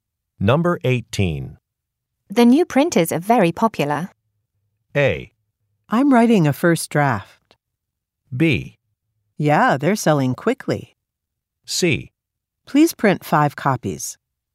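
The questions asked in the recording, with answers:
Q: The new printers are very popular.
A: B: Yeah, they're selling quickly.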